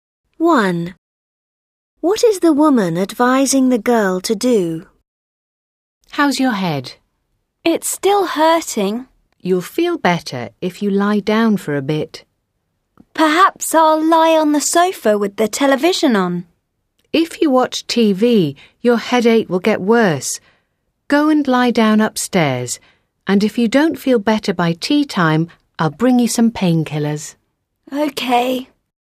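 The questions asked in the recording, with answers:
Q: What is the woman advising the girl to do?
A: Go and lie down upstairs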